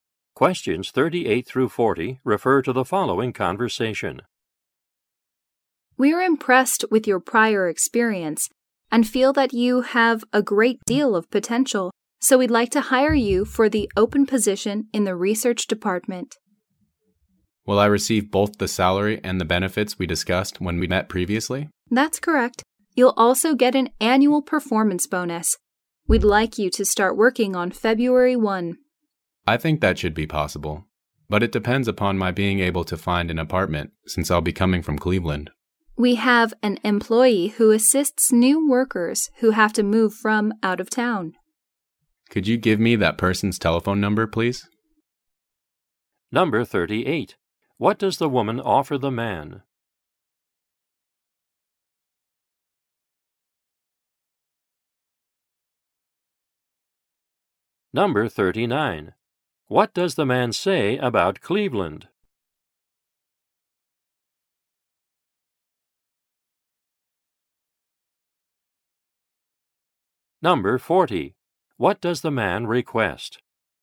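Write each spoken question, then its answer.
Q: What does the woman offer the man?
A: A job in the research department

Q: What does the man say about Cleveland?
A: He will be moving from there

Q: What does the man request?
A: The phone number of the employee who helps new workers move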